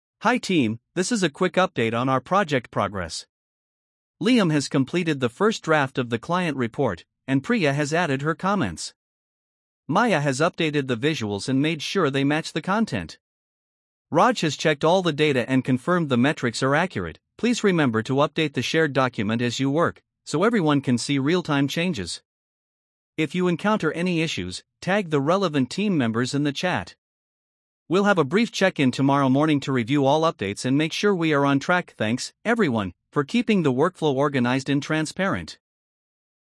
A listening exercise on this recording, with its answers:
Complete the phrases as you listen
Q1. Hi team, this is a quick ______ on our project progress.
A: update

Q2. Liam has completed the first ______ of the client report.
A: draft

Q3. Maya has updated the ______ and made sure they match the content.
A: visuals

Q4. Raj has checked all the data and confirmed the ______ are accurate.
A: metrics

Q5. Please remember to update the ______ document as you work.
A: shared

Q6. If you encounter any issues, ______ the relevant team members in the chat.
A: tag

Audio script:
Hi team, this is a quick update on our project progress. Liam has completed the first draft of the client report, and Priya has added her comments. Maya has updated the visuals and made sure they match the content. Raj has checked all the data and confirmed the metrics are accurate.
Please remember to update the shared document as you work, so everyone can see real-time changes. If you encounter any issues, tag the relevant team members in the chat. We'll have a brief check-in tomorrow morning to review all updates and make sure we are on track.
Thanks, everyone, for keeping the workflow organized and transparent.